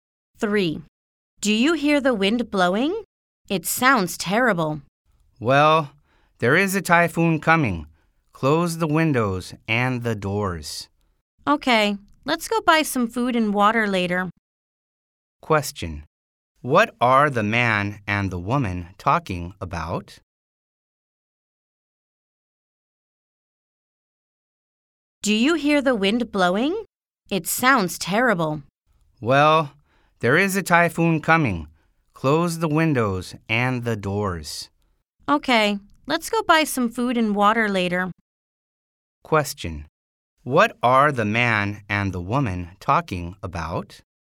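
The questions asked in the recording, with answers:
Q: What are the man and the woman talking about?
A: A typhoon that is coming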